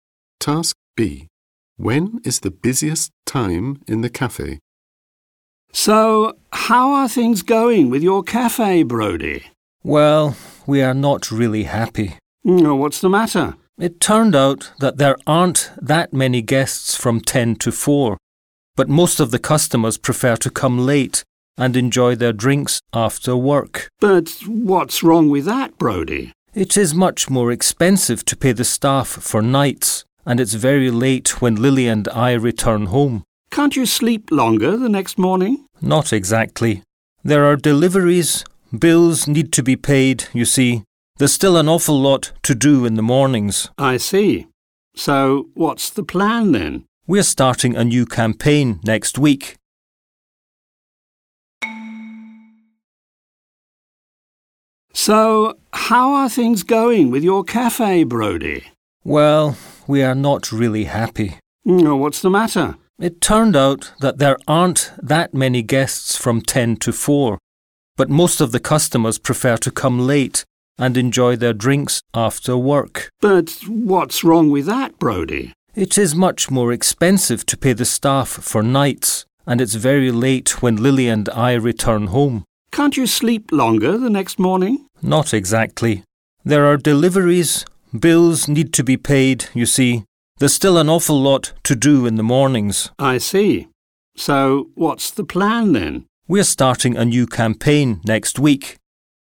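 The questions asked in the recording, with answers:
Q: When is the busiest time in the cafe?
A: Late, in the evening after work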